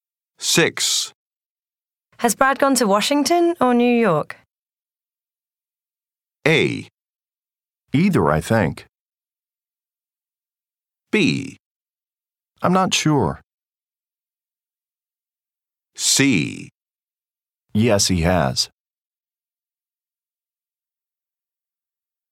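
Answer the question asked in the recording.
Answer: B: I'm not sure.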